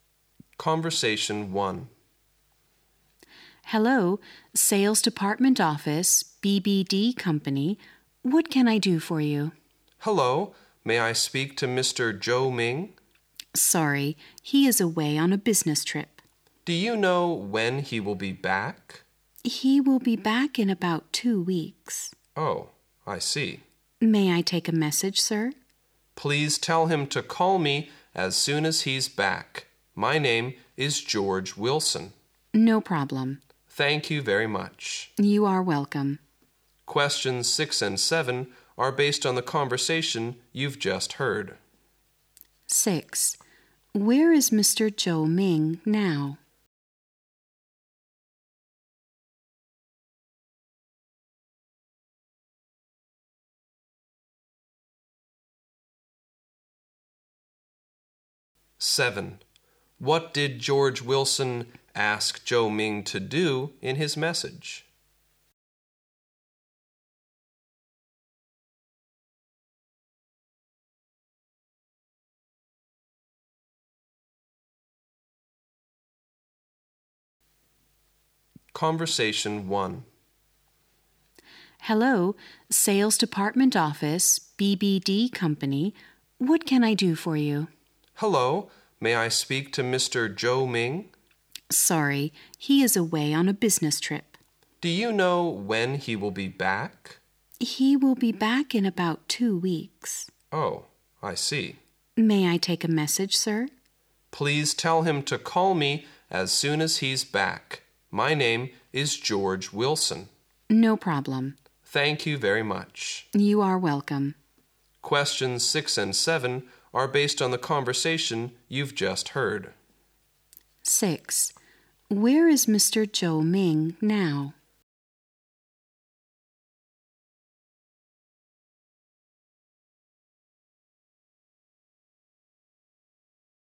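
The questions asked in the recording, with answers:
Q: 6. Where is Mr. Zhou Ming now?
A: Away on a business trip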